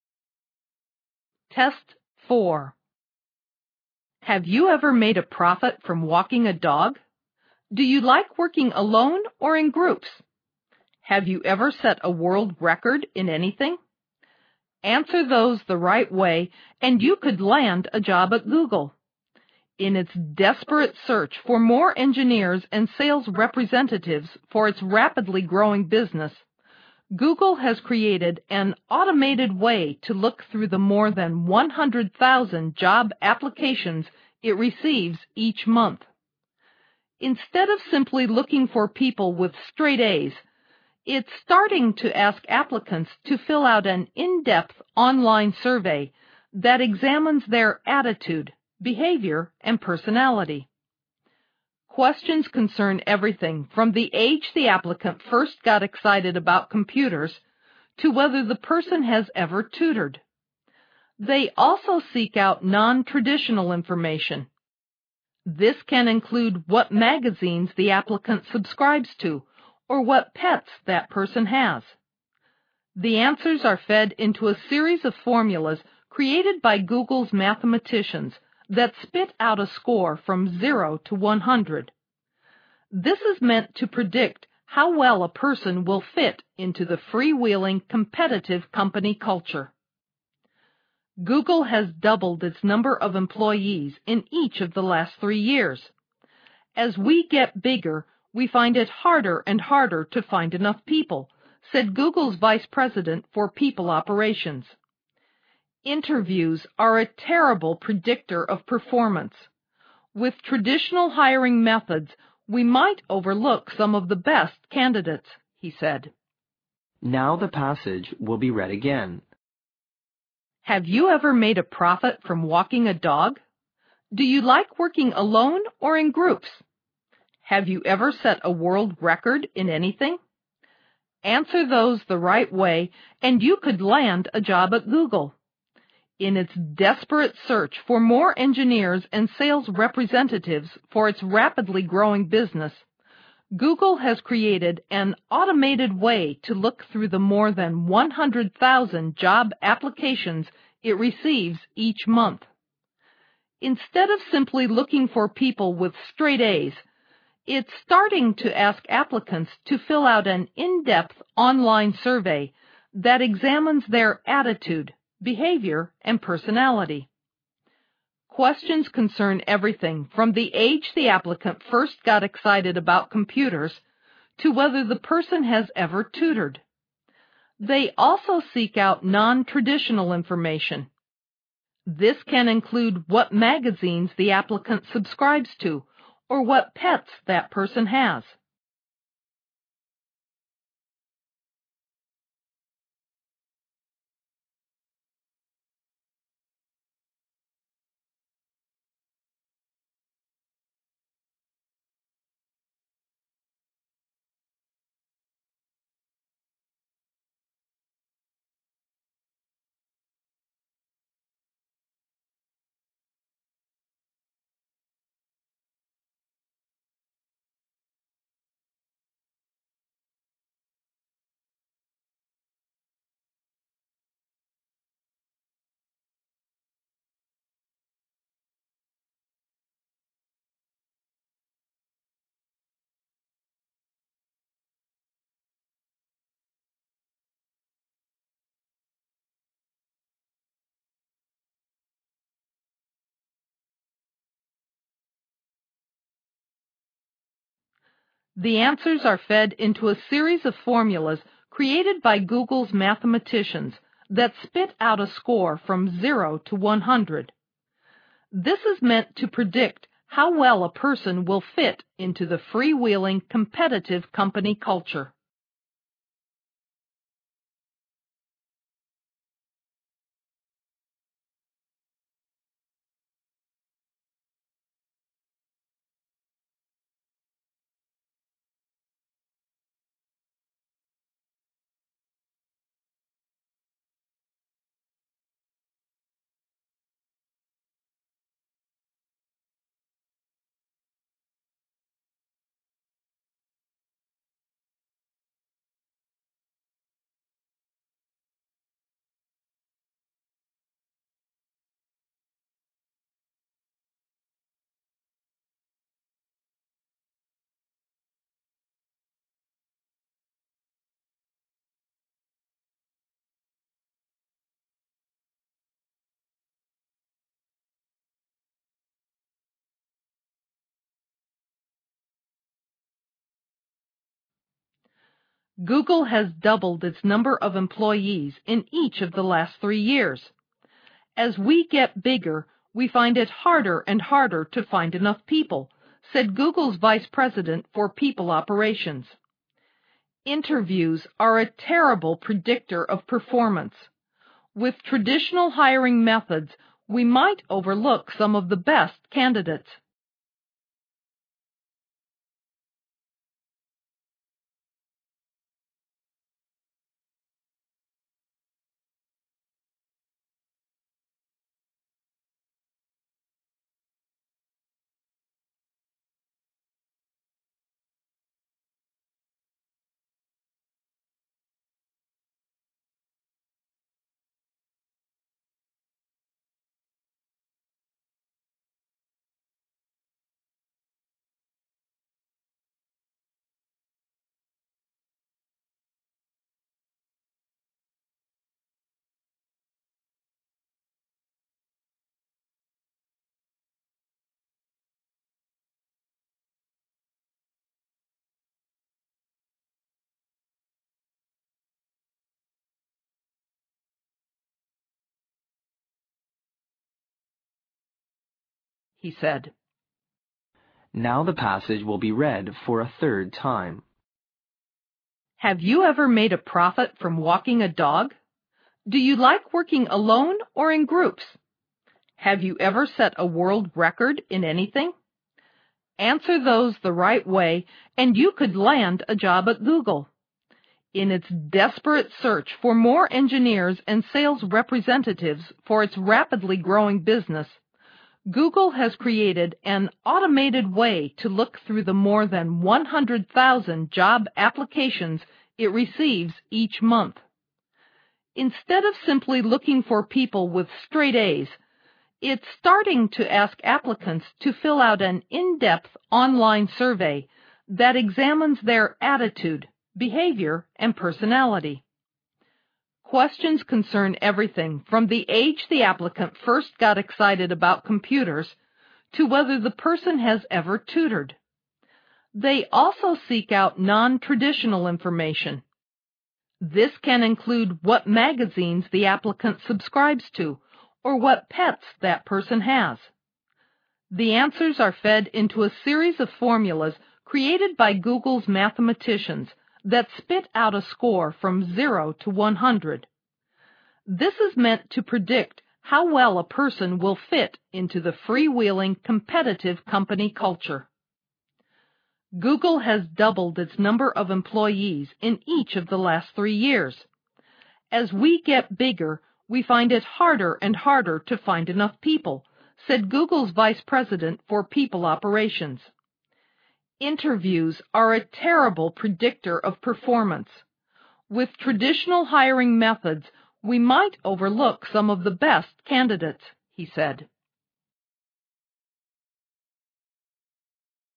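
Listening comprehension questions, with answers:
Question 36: Have you ever set a world (36) ______ in anything?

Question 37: Answer those the right way and you could (37) ______ a job at Google.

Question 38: In its (38) ______ search for more engineers and sales (39) ______ for its rapidly growing business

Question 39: search for more engineers and sales (39) ______ for its rapidly growing business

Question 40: Google has created an (40) ______ way to look through the more than 100,000 job (41) ______ it receives each month.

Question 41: way to look through the more than 100,000 job (41) ______ it receives each month.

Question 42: it's (42) ______ to ask applicants to fill out an in-depth online survey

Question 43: an in-depth online survey that examines their (43) ______ , behavior and personality.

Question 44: (44) ___________________________________________________________________________ .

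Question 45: (45) _____________________________________________________________________________ .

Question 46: "(46) ____________________________________________________________________________________ ," he said.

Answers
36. record
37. land
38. desperate
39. representatives
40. automated
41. applications
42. starting
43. attitude
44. They also seek out non-traditional information. This can include what magazines the applicant subscribes to or what pets that person has
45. This is meant to predict how well a person will fit into the freewheeling, competitive company culture
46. Interviews are a terrible predictor of performance. With traditional hiring methods, we might overlook some of the best candidates

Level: 六级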